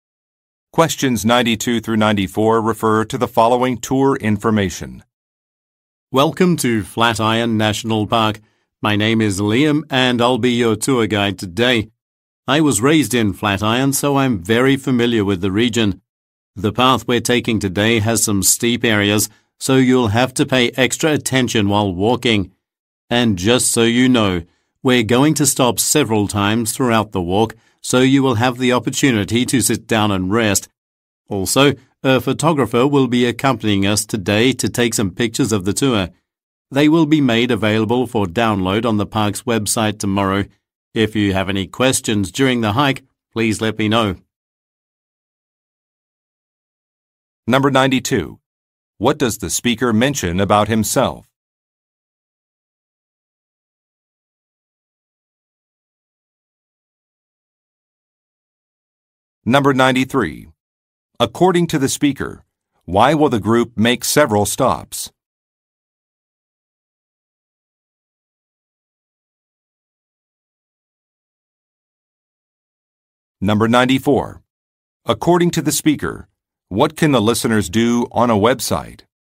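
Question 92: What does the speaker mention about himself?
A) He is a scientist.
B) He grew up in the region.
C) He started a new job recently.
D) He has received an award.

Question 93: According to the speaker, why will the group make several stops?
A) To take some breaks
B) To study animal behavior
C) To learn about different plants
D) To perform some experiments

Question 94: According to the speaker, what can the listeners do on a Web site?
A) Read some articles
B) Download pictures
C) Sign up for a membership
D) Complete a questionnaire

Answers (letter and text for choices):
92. B) He grew up in the region.
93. A) To take some breaks
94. B) Download pictures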